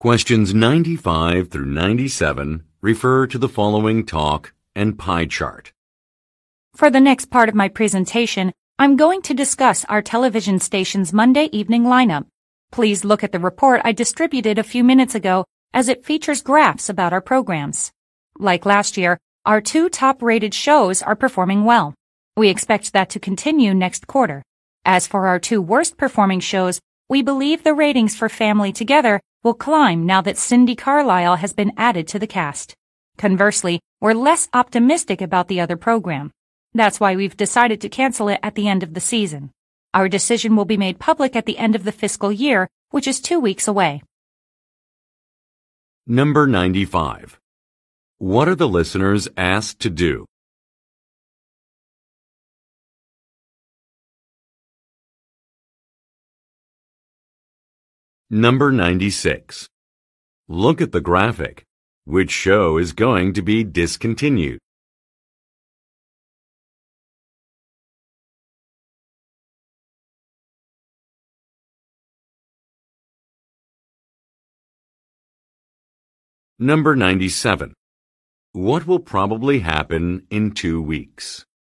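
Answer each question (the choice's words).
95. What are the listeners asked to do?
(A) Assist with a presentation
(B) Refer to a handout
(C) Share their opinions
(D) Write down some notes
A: Refer to a handout

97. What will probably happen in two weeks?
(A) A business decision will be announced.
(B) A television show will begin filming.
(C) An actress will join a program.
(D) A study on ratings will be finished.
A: A business decision will be announced.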